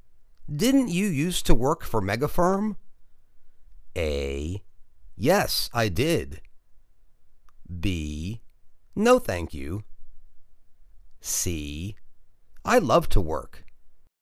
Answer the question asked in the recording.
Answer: Yes, I did.